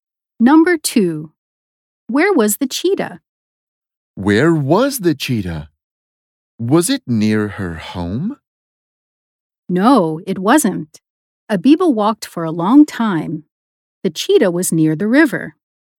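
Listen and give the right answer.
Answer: near the river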